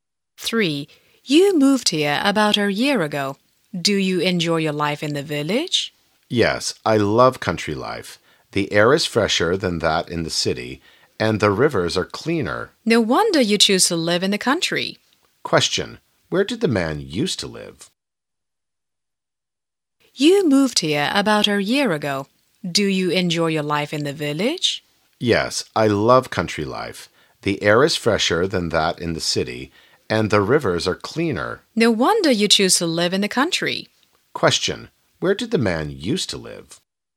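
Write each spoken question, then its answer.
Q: Where did the man used to live?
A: In the city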